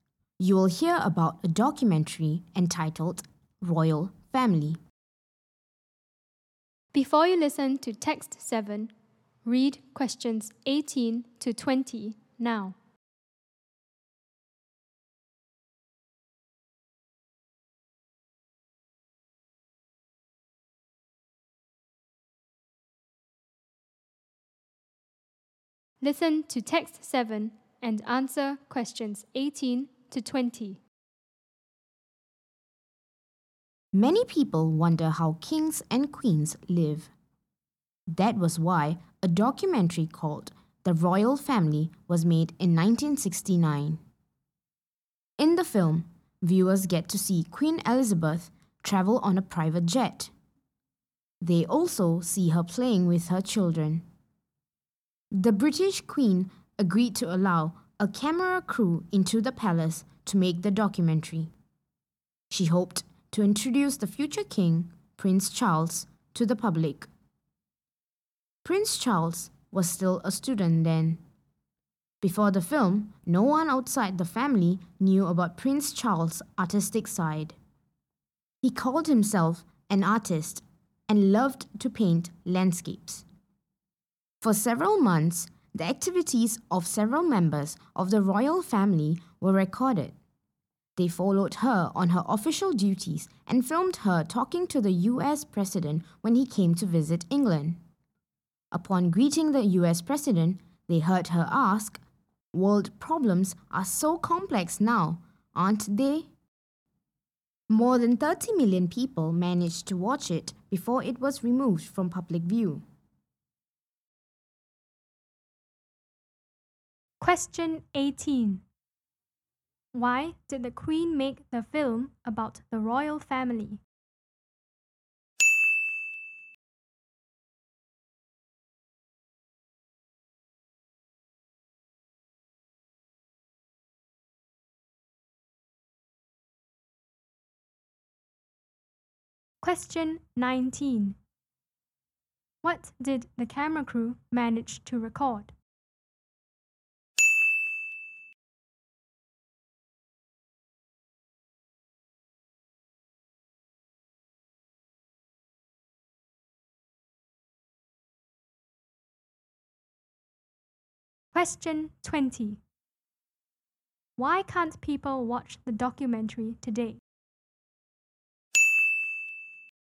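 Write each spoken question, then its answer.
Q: Why did the Queen make the film about the royal family?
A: To introduce the future king, Prince Charles, to the public

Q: Why can't people watch the documentary today?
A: It was removed from public view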